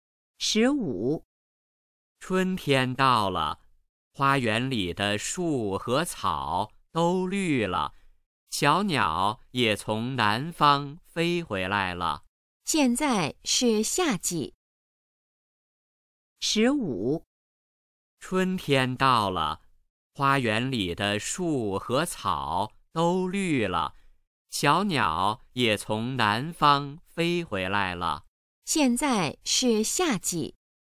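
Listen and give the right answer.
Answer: 错(现在是春天)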